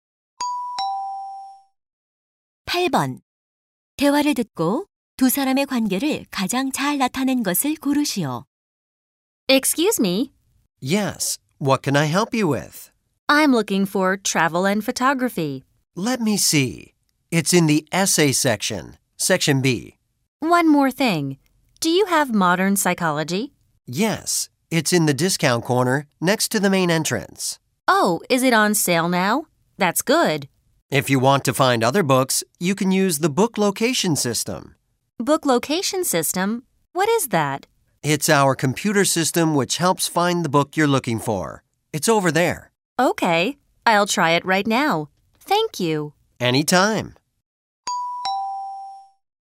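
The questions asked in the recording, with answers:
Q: 대화를 듣고 두 사람의 관계를 가장 잘 나타낸 것을 고르시오.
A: 서점 직원과 손님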